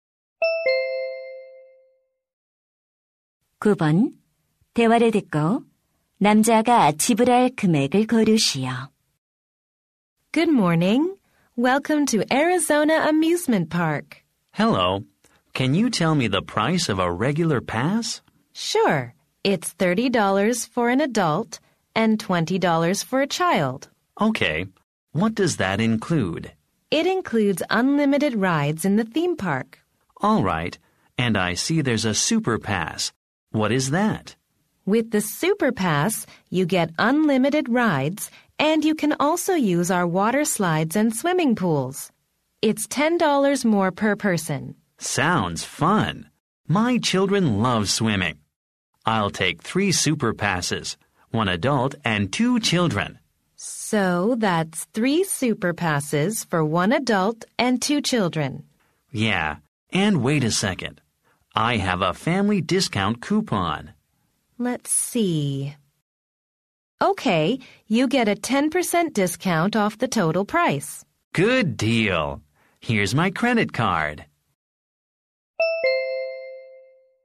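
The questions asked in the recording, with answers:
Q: 대화를 듣고 남자가 지불할 금액을 고르시오.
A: 90달러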